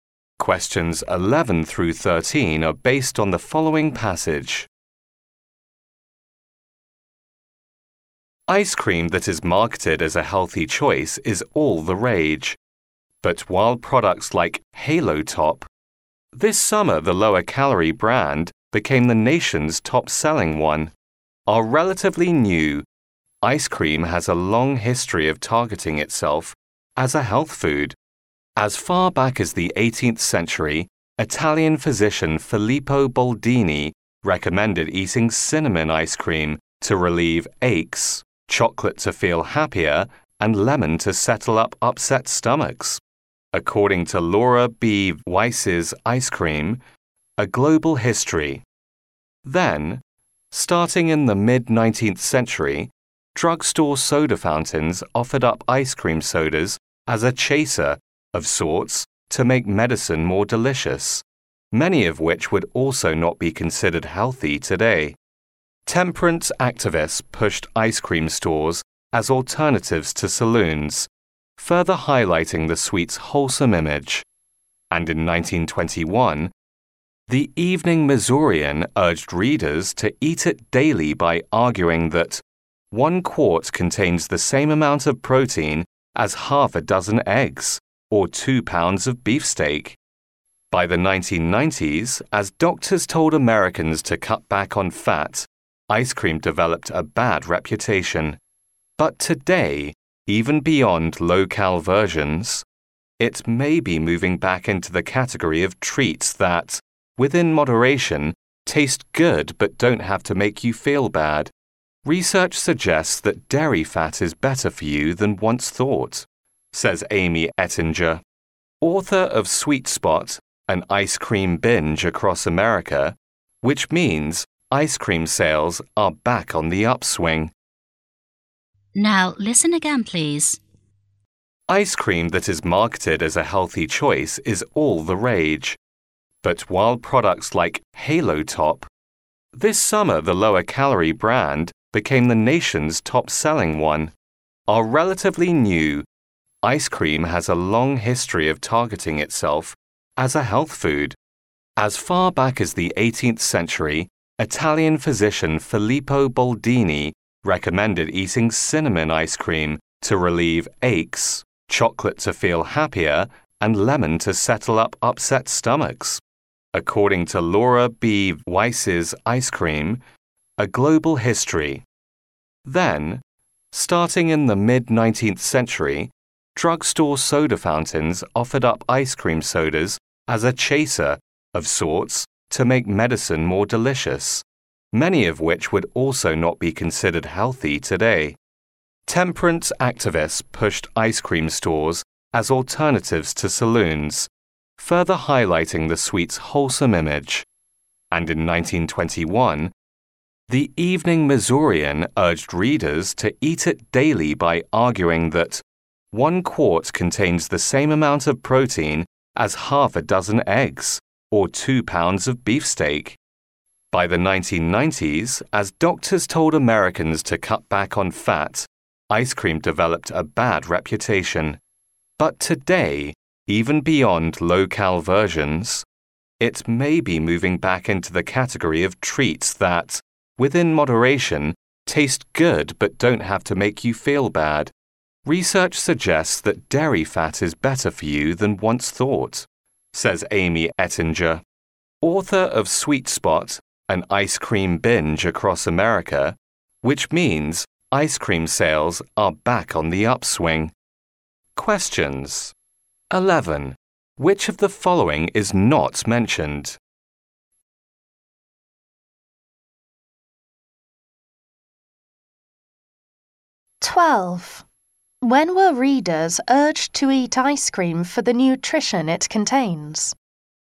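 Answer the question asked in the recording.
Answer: In 1921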